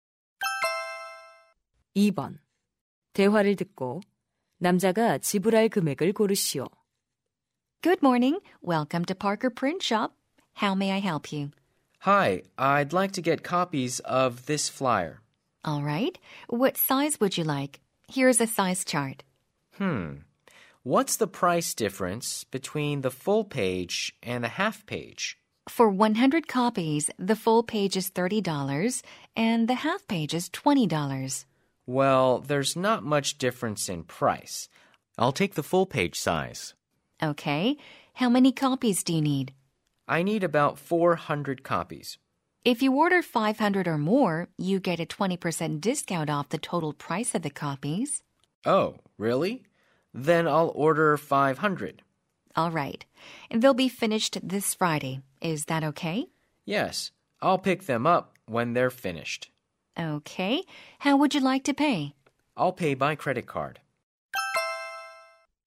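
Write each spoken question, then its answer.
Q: 대화를 듣고 남자가 지불할 금액을 고르시오.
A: $120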